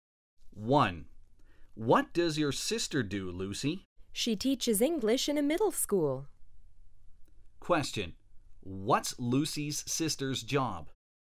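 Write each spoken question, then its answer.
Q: What's Lucy's sister's job?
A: She is an English teacher.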